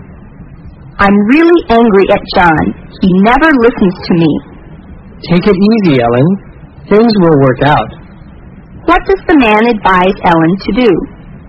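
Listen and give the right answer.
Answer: Calm down; things will work out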